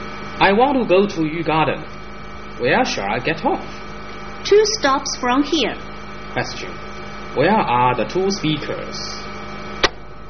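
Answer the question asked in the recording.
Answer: On a bus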